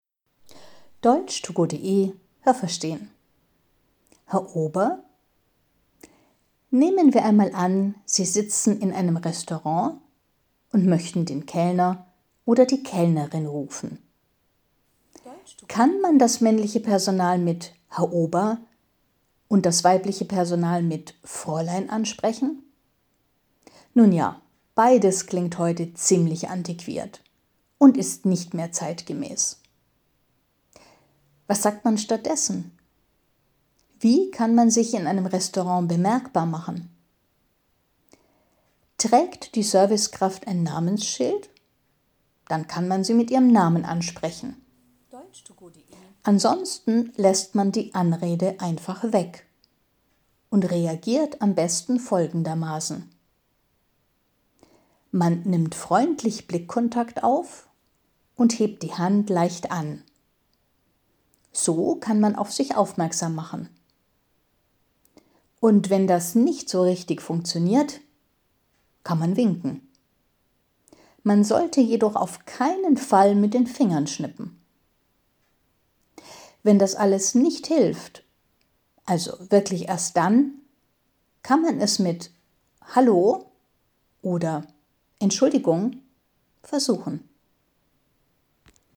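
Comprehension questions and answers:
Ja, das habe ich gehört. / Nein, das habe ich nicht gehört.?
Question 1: Wenn man heute die Anrede „Herr Ober" für einen Kellner benutzt, dann klingt das altmodisch.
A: Ja, das habe ich gehört.

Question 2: Wenn man heute die Anrede „Fräulein" für eine Kellnerin benutzt, dann klingt das nicht altmodisch, sondern modern.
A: Nein, das habe ich nicht gehört.

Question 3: Trägt ein Kellner oder eine Kellnerin ein Namensschild, dann kann man bei der Anrede diesen Namen benutzen.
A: Ja, das habe ich gehört.

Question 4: Gibt es kein Namensschild, dann kann man die Anrede weglassen.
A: Ja, das habe ich gehört.

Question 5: Will man sich bemerkbar machen, dann schaut man den Kellner oder die Kellnerin direkt an und hebt leicht die Hand.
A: Ja, das habe ich gehört.

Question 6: Wenn das nicht funktioniert, dann kann man winken und mit den Fingern schnippen.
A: Nein, das habe ich nicht gehört.

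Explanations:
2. Die Anrede „Fräulein" für eine Kellnerin ist auch altmodisch und passt nicht mehr in die heutige Zeit.
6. Winken ist dann in Ordnung. Aber man sollte nie mit den Fingern schnippen.

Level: B1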